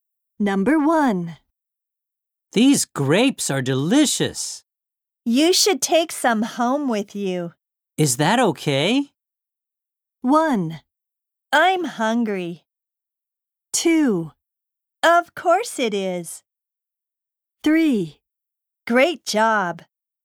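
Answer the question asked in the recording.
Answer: 2: Of course it is.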